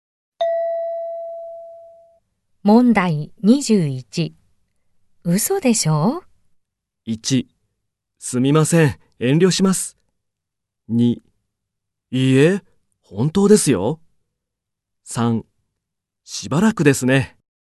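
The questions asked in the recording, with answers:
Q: 嘘でしょ?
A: 2: いいえ、本当ですよ。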